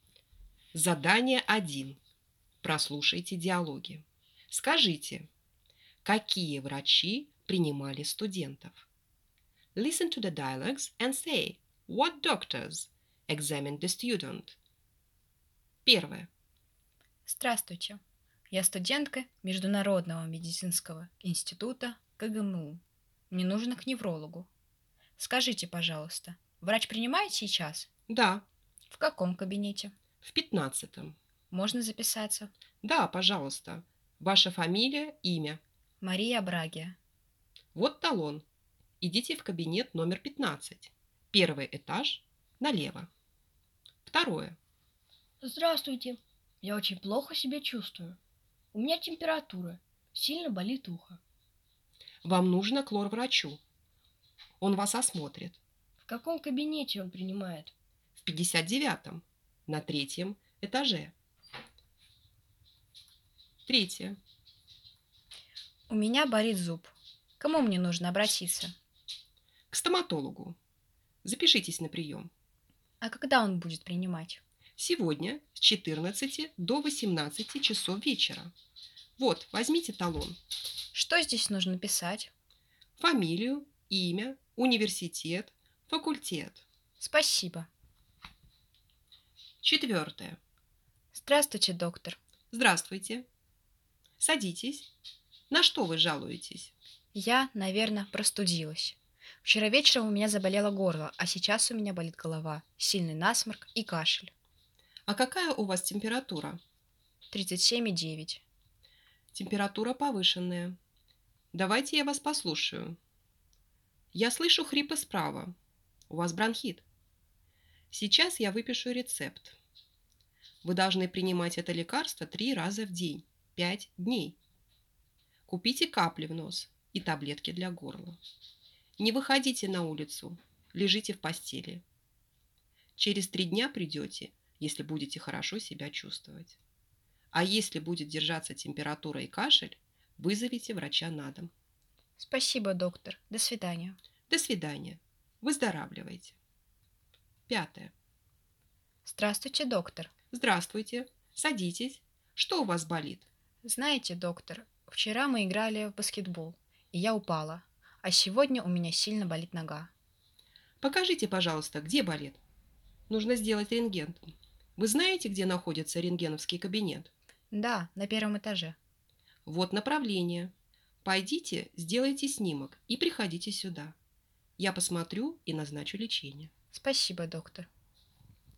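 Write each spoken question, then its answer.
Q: Скажите, какие врачи принимали студентов?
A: Невролог

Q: Скажите, какие врачи принимали студентов?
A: Лор-врач

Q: Скажите, какие врачи принимали студентов?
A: Стоматолог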